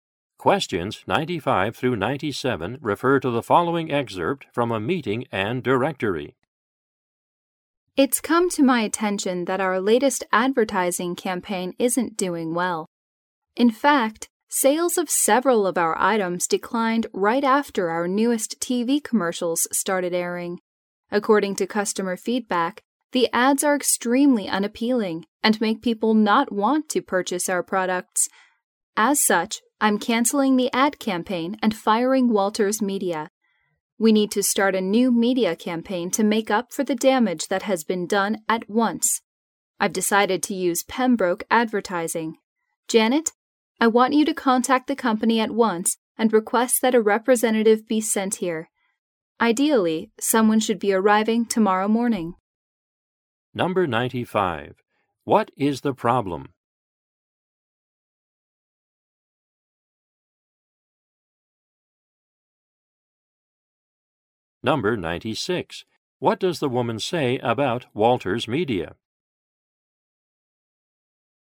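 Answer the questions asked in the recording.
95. The ad campaign is hurting sales
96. She is firing them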